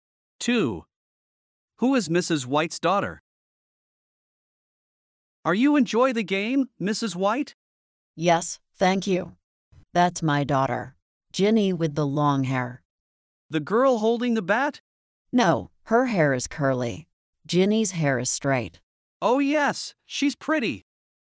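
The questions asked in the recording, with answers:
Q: Who is Mrs. White's daughter?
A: Ginny, the girl with long straight hair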